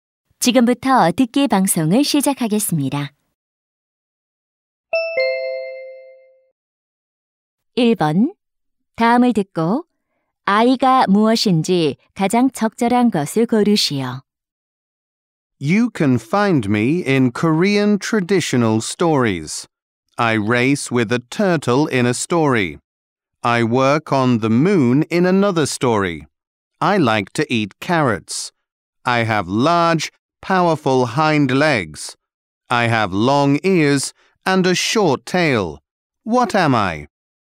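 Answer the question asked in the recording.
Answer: 토끼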